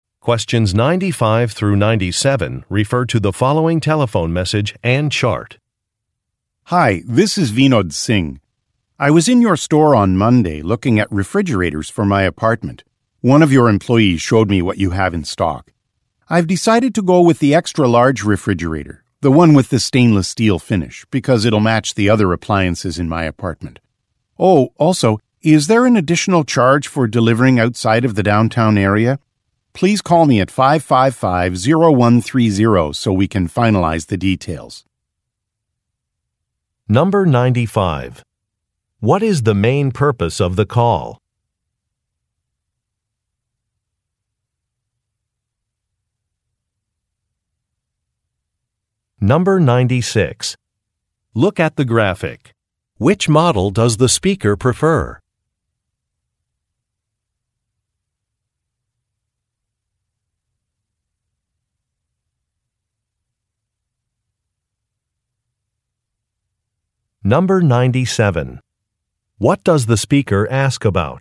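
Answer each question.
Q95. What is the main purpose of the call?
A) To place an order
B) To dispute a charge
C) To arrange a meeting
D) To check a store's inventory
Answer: A) To place an order

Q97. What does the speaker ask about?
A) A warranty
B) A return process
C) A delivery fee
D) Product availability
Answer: C) A delivery fee

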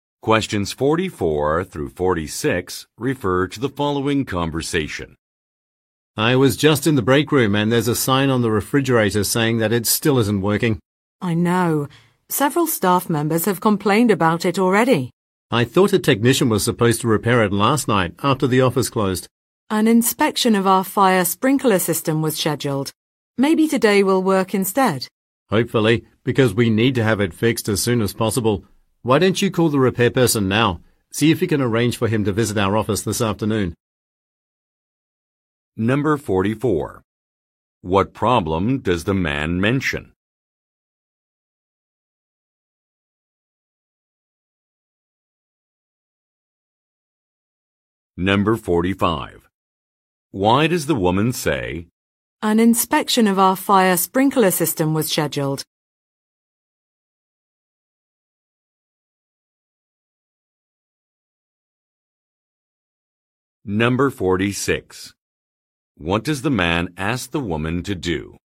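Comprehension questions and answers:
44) What problem does the man mention?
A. A sign has been taken down.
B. A delivery has been delayed.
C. An appliance is malfunctioning.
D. A staff member is absent.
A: C. An appliance is malfunctioning.

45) Why does the woman say, "An inspection of our fire sprinkler system was scheduled"?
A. To apologize for a mistake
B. To agree with a colleague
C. To draw attention to a complaint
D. To provide a reason for delay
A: D. To provide a reason for delay

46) What does the man ask the woman to do?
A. Set up an appointment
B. Empty out a refrigerator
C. Check a schedule online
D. Test a sprinkler system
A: A. Set up an appointment

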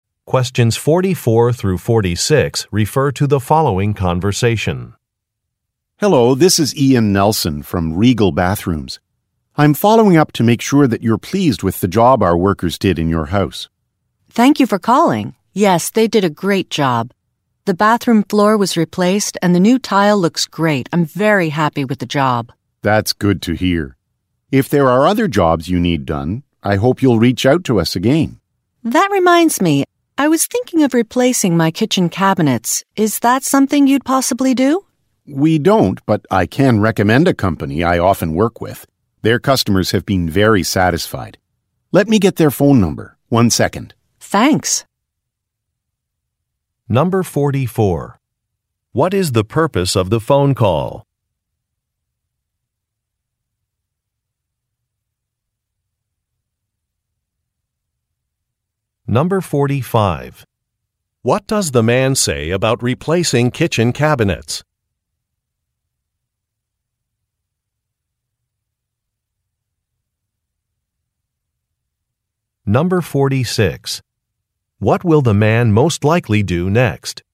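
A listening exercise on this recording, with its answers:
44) What is the purpose of the phone call?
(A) To help a customer choose a product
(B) To check on a customer's satisfaction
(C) To inform a customer of a price estimate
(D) To advertise a special offer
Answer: (B) To check on a customer's satisfaction

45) What does the man say about replacing kitchen cabinets?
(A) He guarantees his company will do a good job.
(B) His company is too busy to do the work.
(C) His company does not do that type of work.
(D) He thinks it will be an expensive job.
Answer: (C) His company does not do that type of work.

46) What will the man most likely do next?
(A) Send workers to the woman's house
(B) Find a telephone number for the woman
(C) Check kitchen cabinet prices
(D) Discuss a new product with some workers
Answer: (B) Find a telephone number for the woman

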